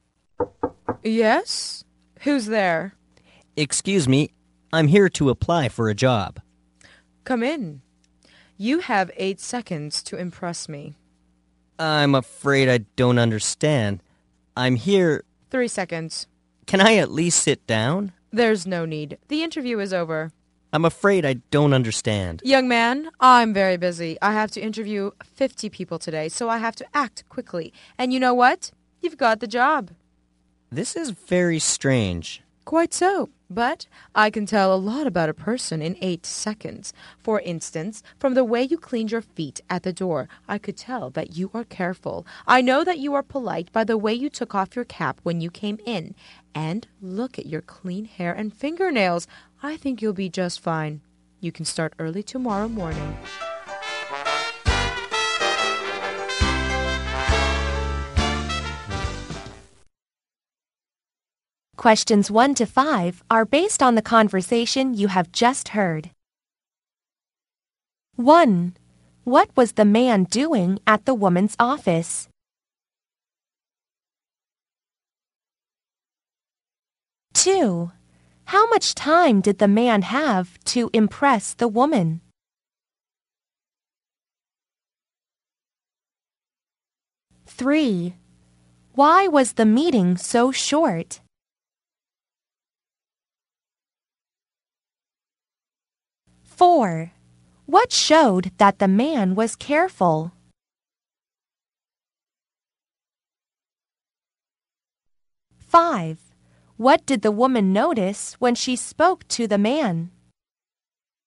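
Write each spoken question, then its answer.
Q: What was the man doing at the woman's office?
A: Applying for a job

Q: How much time did the man have to impress the woman?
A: 8 seconds

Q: Why was the meeting so short?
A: She had to interview 50 people that day

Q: What showed that the man was careful?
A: The way he cleaned his feet at the door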